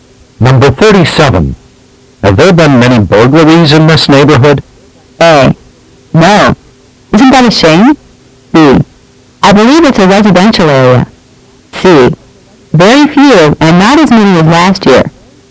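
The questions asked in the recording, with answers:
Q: Have there been many burglaries in this neighborhood?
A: C: Very few, and not as many as last year.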